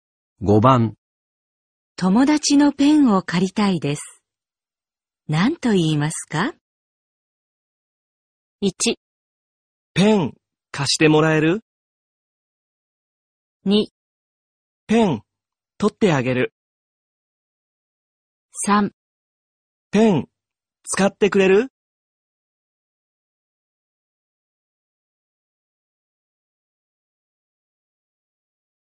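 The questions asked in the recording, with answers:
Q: 友達のペンを借りたいです。何と言いますか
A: 1: ペン貸してもらえる

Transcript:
1
ペン、貸してもらえる?
2
ペン、取ってあげる。
3
ペン、使ってくれる?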